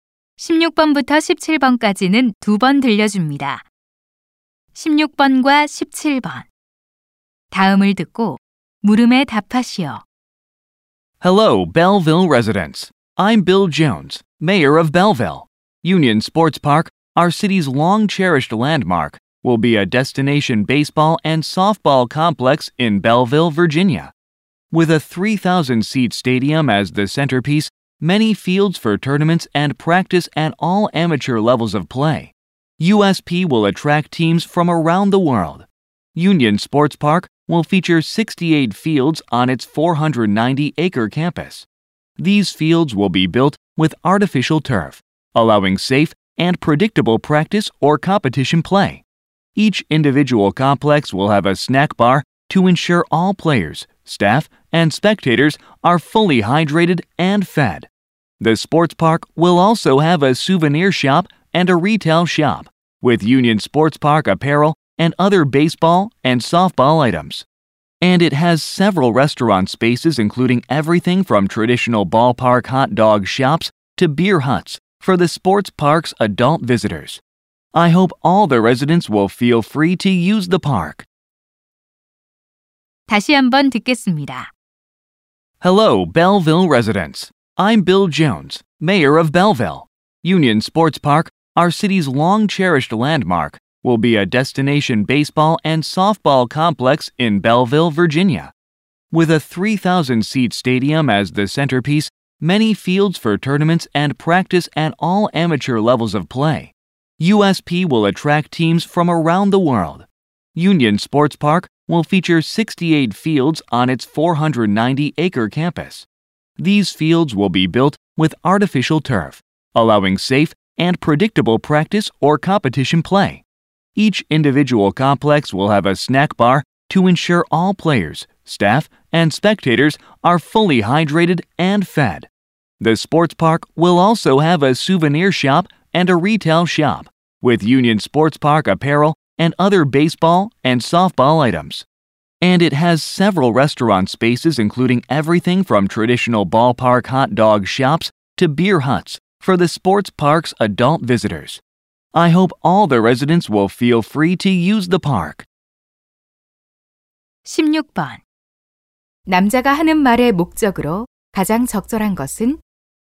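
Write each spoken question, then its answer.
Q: 남자가 하는 말의 목적으로 가장 적절한 것은?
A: 유니언 스포츠 파크를 소개하려고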